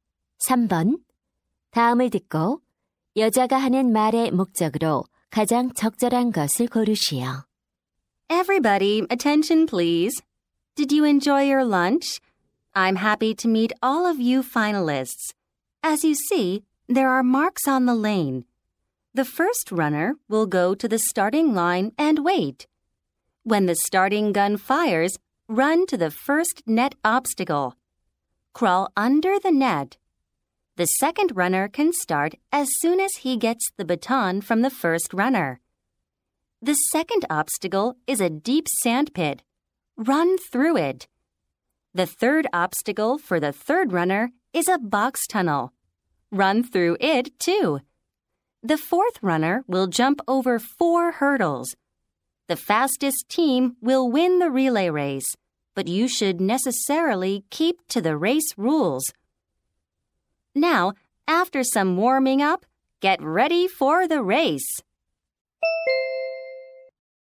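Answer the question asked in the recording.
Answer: 릴레이 경주 규칙과 방법을 설명하려고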